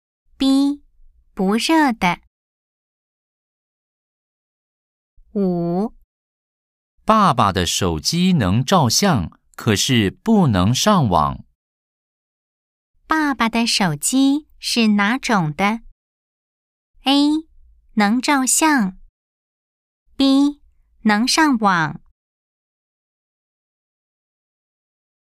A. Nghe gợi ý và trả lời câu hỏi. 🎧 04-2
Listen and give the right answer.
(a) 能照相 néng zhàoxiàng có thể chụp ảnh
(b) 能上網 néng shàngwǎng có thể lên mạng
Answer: (a) 能照相 néng zhàoxiàng có thể chụp ảnh